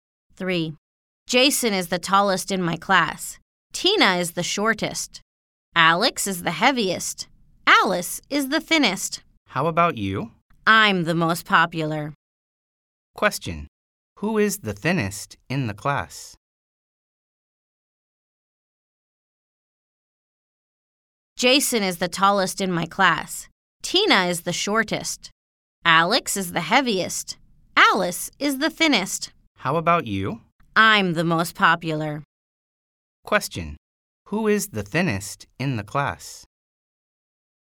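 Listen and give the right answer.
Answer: Alice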